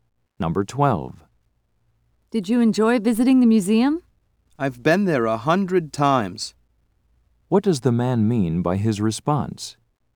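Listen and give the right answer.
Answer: He has been there many times, so it was not special.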